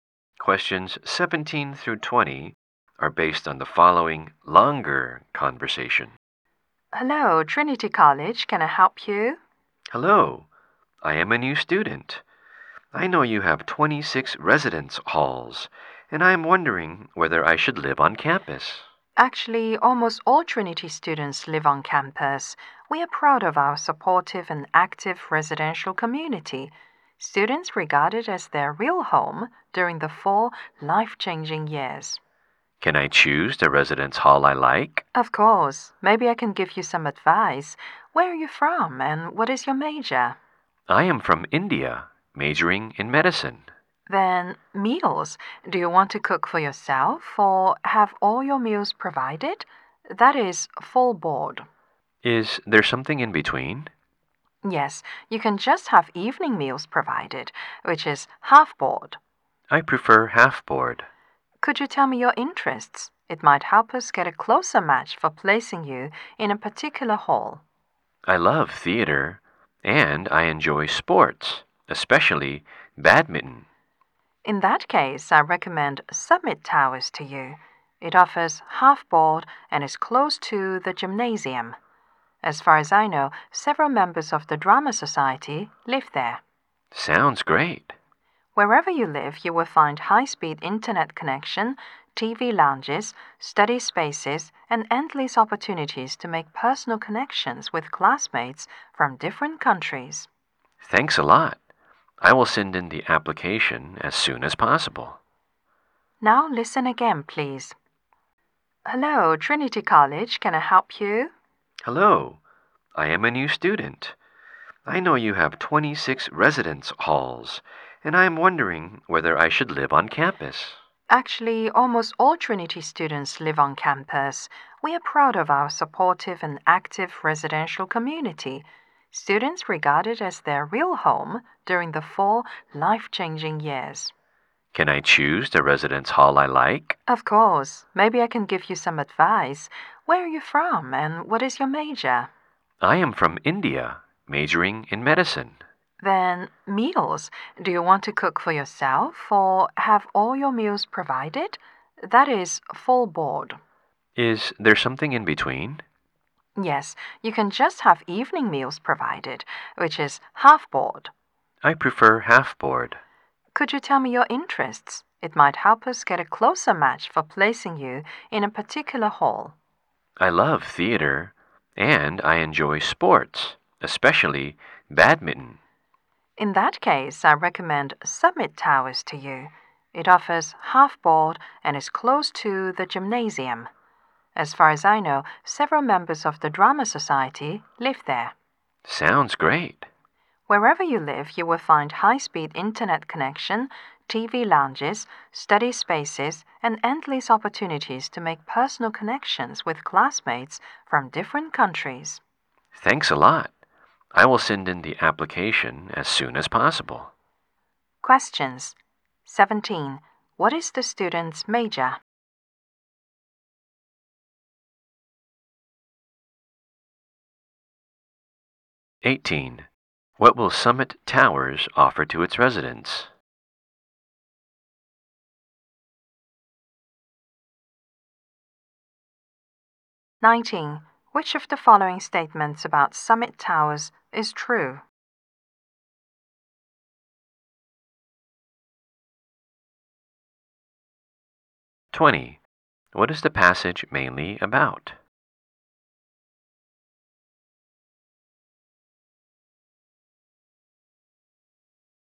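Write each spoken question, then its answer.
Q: What is the student's major?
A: Medicine

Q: What will Summit Towers offer to its residents?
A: Half board (evening meals)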